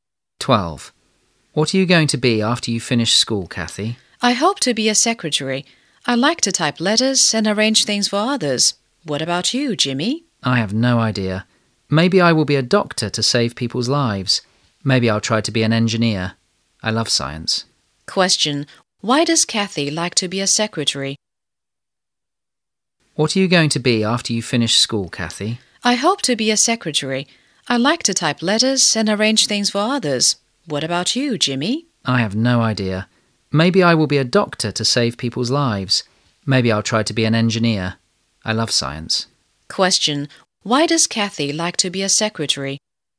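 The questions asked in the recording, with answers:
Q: Why does Kathy like to be a secretary?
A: She likes to type letters and arrange things for others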